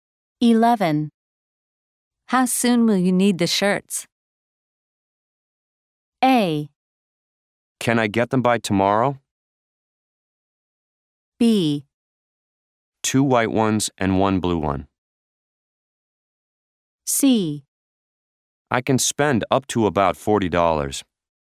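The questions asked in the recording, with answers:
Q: How soon will you need the shirts?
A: A: Can I get them by tomorrow?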